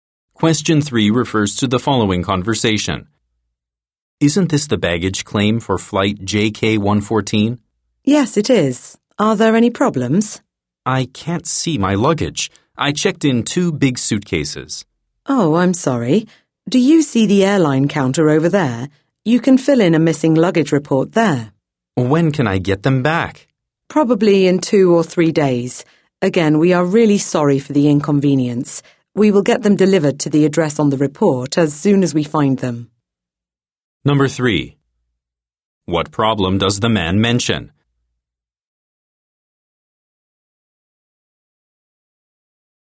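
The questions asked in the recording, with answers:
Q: What problem does the man mention?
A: His luggage is missing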